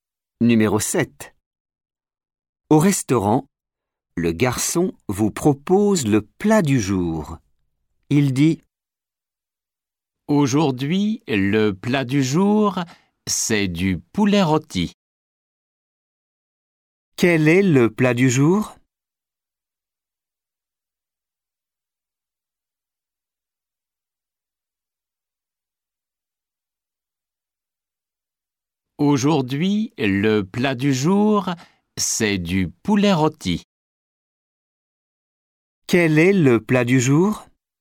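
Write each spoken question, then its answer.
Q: Quel est le plat du jour?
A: Du poulet rôti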